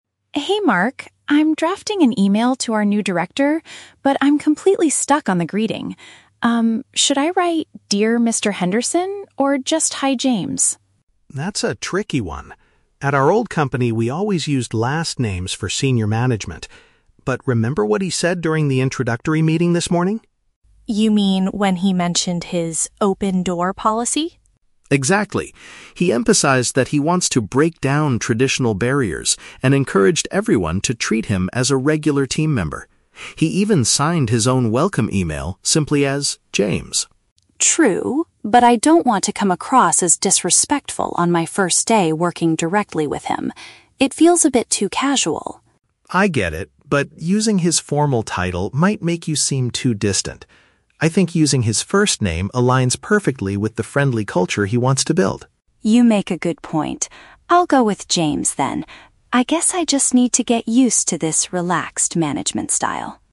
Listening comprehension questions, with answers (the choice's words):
Listen to the conversation between two employees and choose the correct answer (A, B, or C).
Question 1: What is Sophie's main problem at the beginning of the conversation?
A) She forgot the new director's official job title.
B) She does not know how to politely start her electronic message.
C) She cannot remember the password to her company email account.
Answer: She does not know how to politely start her electronic message.

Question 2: Why does Mark suggest using the director's first name?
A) Because it matches the approachable environment the new boss wants to create.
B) Because they always used informal names at their previous workplace.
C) Because the director explicitly warned the staff not to use formal titles.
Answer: Because it matches the approachable environment the new boss wants to create.

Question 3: How does Sophie feel about using the informal greeting at first?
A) She is worried that the rest of the team will make fun of her.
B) She believes it will make her seem too distant from the management.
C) She thinks it might make her appear impolite to her superior.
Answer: She thinks it might make her appear impolite to her superior.

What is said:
Sophie: Hey Mark, I'm drafting an email to our new director, but I'm completely stuck on the greeting. Um, should I write 'Dear Mr. Henderson' or just 'Hi James'?
Mark: That's a tricky one. At our old company, we always used last names for senior management. But remember what he said during the introductory meeting this morning?
Sophie: You mean when he mentioned his 'open-door policy'?
Mark: Exactly. He emphasized that he wants to break down traditional barriers and encouraged everyone to treat him as a regular team member. He even signed his own welcome email simply as 'James'.
Sophie: True. But I don't want to come across as disrespectful on my first day working directly with him. It feels a bit too casual.
Mark: I get it, but using his formal title might make you seem too distant. I think using his first name aligns perfectly with the friendly culture he wants to build.
Sophie: You make a good point. I'll go with 'James' then. I guess I just need to get used to this relaxed management style.